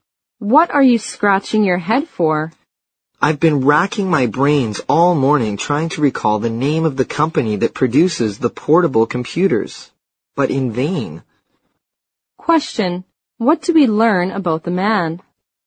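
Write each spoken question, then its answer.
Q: What do we learn about the man?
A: He can't remember the name of the company that makes the portable computers.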